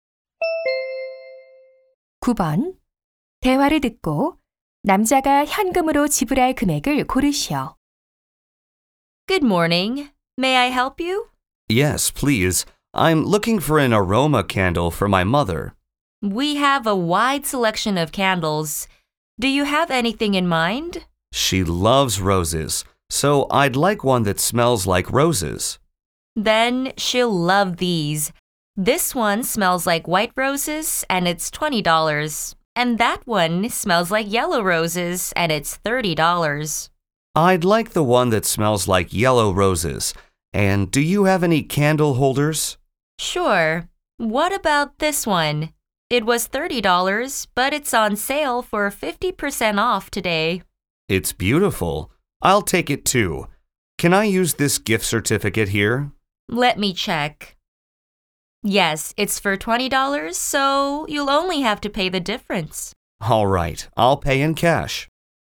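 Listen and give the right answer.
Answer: $25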